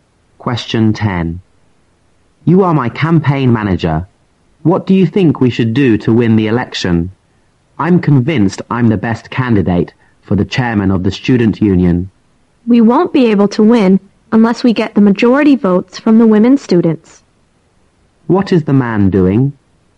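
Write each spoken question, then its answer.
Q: What is the man doing?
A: Running for chairman of the student union.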